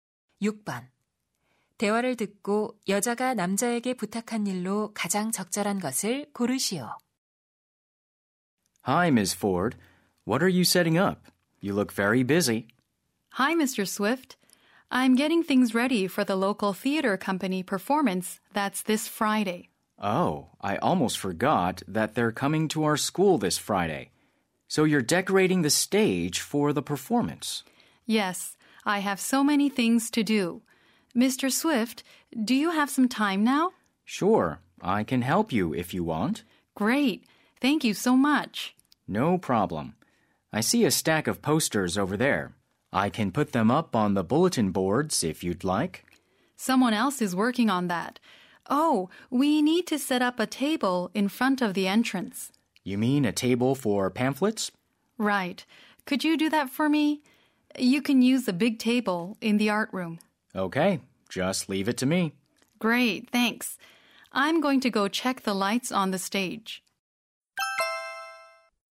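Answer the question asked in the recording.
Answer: 입구 앞에 테이블 설치하기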